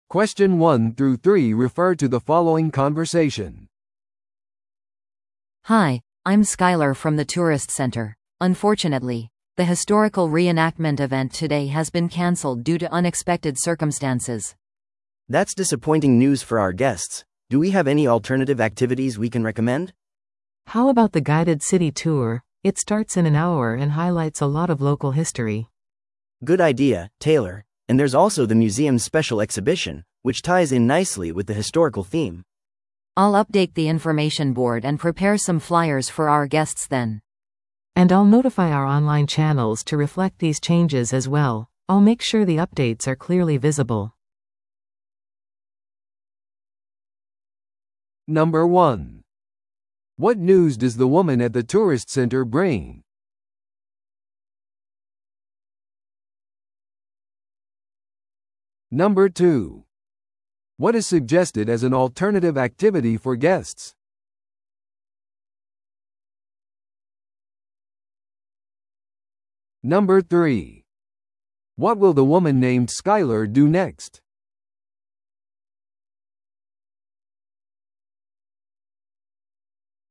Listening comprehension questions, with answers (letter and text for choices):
Listen to the audio below and answer the questions.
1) What news does the woman at the tourist center bring?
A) 歴史イベントは予定通り行われます。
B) ガイド付き市内ツアーは1時間未満で始まります。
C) 代替の博物館展示が可能です。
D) 歴史再現イベントは中止になりました。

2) What is suggested as an alternative activity for guests?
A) 観光案内所の情報掲示板を訪れる。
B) ガイド付き市内ツアーに参加する。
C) 観光案内所のオンラインチャンネルの更新を手伝う。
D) 観光案内所からチラシを集める。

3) What will the woman named Skyler do next?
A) 市内ツアーを案内する。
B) オンラインで変更についてゲストに通知する。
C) 情報掲示板とチラシの更新準備をする。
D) ゲストに異なる観光スポットを推薦する。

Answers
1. D) 歴史再現イベントは中止になりました。
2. B) ガイド付き市内ツアーに参加する。
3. C) 情報掲示板とチラシの更新準備をする。

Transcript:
Unfortunately, the historical reenactment event today has been canceled due to unexpected circumstances.
B: That's disappointing news for our guests. Do we have any alternative activities we can recommend?
C: How about the guided city tour? It starts in an hour and highlights a lot of local history.
B: Good idea, Taylor. And there's also the museum's special exhibition, which ties in nicely with the historical theme.
A: I'll update the information board and prepare some flyers for our guests then.
C: And I'll notify our online channels to reflect these changes as well. I'll make sure the updates are clearly visible.